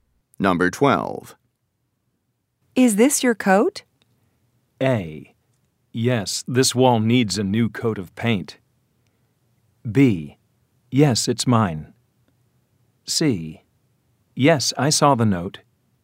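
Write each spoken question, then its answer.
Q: Is this your coat?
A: B: Yes, it's mine.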